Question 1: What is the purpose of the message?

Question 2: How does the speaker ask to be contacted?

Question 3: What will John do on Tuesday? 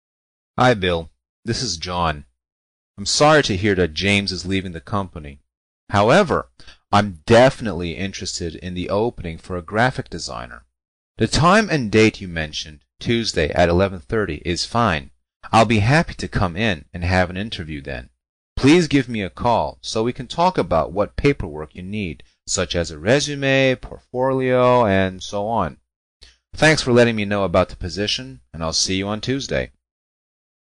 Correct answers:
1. (B) To return an earlier phone call
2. (D) By telephone
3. (A) Have an interview for a new job